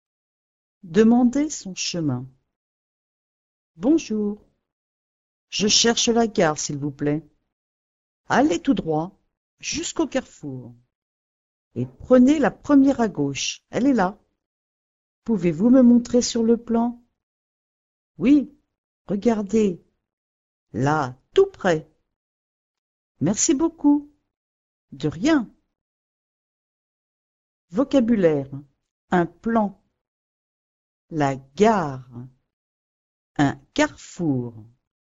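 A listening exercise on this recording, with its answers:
Escucha el audio y contesta a las preguntas:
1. Il demande son .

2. Le garçon cherche la .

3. Il doit aller tout .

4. Au il tournera à gauche.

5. Il veut voir la direction sur un .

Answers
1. chemin
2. gare
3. droit
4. carrefour
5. plan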